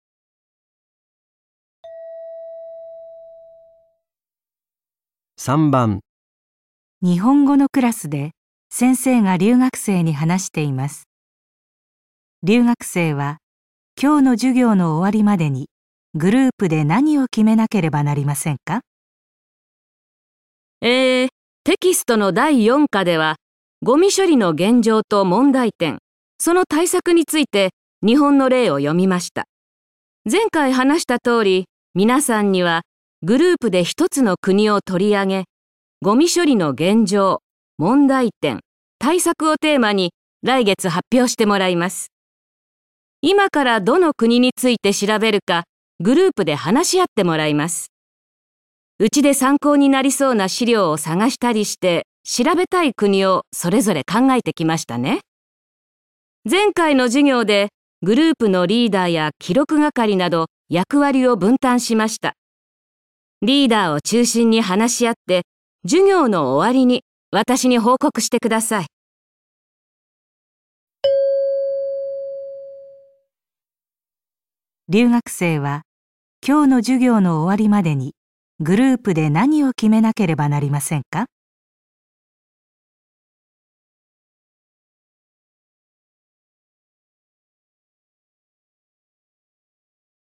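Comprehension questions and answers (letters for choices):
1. 留学生は今日の授業の終わるまでにグループで何を決めなければなりませんか。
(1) 発表のテーマ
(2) 発表で取り上げる国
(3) グループの係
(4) しりょう集めのぶんたん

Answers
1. 2

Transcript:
前回話した通り皆さんにはグループで一つの国を取り上げ、ごみ処理の現状、問題点、対策をテーマに来月発表してもらいます。今からどの国について調べるか、グループで話し合ってもらいます。うちで参考になりそうな資料を探したりして、調べたい国をそれぞれ考えて来ましたね。前回の授業でグループのリーダーや記録係など役割を分担しました。リーダーを中心に話し合って、授業の終わりに、私に報告してください。

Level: N2 第3回】聴解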